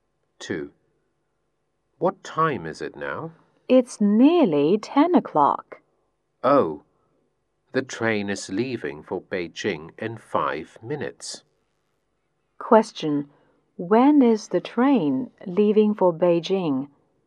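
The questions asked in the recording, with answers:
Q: When is the train leaving for Beijing?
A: In 5 minutes, at about five past ten.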